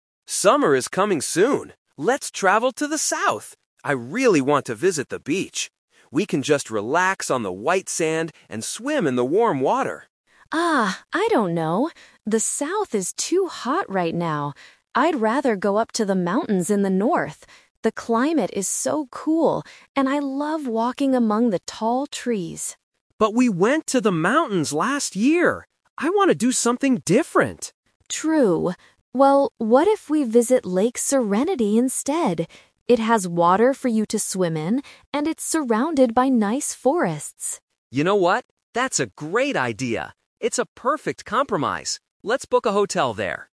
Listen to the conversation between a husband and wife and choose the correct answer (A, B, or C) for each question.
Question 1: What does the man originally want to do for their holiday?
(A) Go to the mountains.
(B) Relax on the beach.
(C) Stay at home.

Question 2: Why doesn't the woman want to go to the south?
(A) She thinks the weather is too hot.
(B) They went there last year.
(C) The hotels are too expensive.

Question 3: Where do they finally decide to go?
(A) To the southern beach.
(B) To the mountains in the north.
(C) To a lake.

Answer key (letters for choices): 1B, 2A, 3C

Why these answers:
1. Why B is correct: The man clearly states his plan at the beginning: "I really want to visit the beach. We can just relax on the white sand..." Why A is a trap: Going to the mountains is what the woman wants to do, not the man. Why C is wrong: Staying at home is never mentioned in the conversation.
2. Why A is correct: The woman directly gives her reason: "The south is too hot right now." Why B is a trap: "Last year" is mentioned in the audio, but the man says they went to the mountains last year, not the south. Why C is wrong: The cost of hotels or being expensive is not discussed.
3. Why C is correct: This is the "Twist" of the A2 level. They argue about the beach and the mountains, but then the woman suggests "Lake Serenity instead," and the man agrees ("Let's book a hotel there"). Why A & B are traps: Both the beach and the mountains are discussed for most of the conversation, but they are rejected in the end.

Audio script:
Man: Summer is coming soon. Let's travel to the south! I really want to visit the beach. We can just relax on the white sand and swim in the warm water.
Woman: Oh, I don't know. The south is too hot right now. I'd rather go up to the mountains in the north. The climate is so cool, and I love walking among the tall trees.
Man: But we went to the mountains last year! I want to do something different.
Woman: True... Well, what if we visit Lake Serenity instead? It has water for you to swim in, and it's surrounded by nice forests.
Man: You know what? That's a great idea. It's a perfect compromise. Let's book a hotel there.